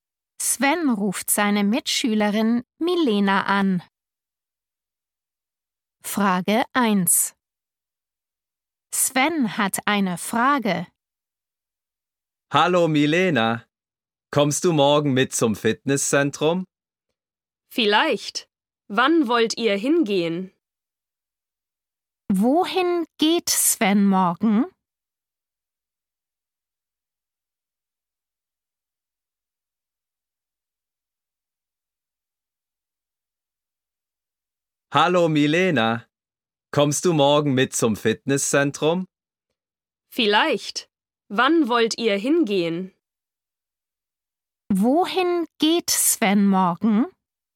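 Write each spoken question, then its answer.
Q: Wohin geht Sven morgen?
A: zum Fitnesszentrum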